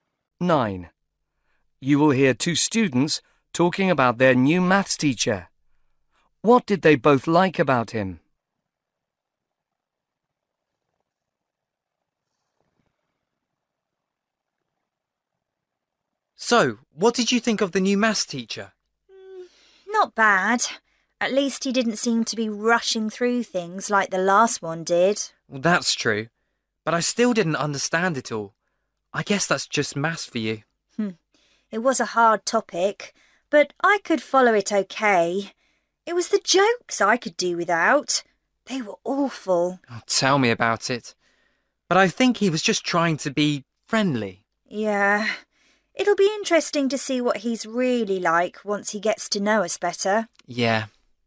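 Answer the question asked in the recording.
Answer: He didn't rush through things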